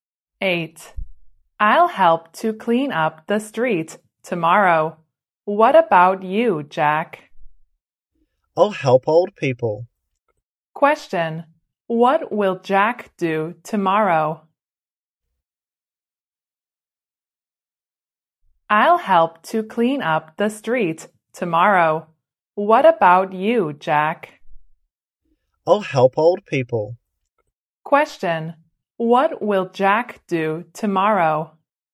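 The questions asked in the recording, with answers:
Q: What will Jack do tomorrow?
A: Help old people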